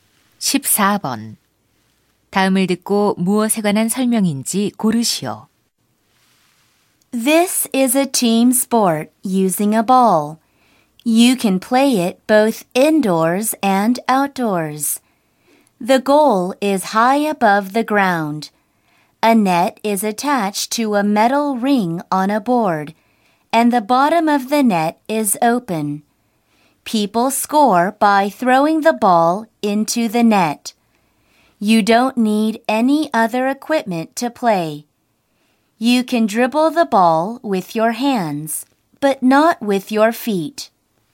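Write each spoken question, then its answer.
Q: 다음을 듣고 무엇에 관한 설명인지 고르시오.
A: 농구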